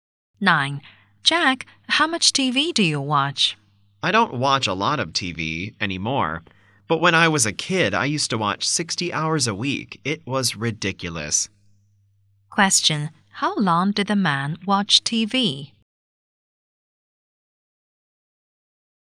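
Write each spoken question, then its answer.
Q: How long did the man watch TV?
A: 60 hours a week when he was a kid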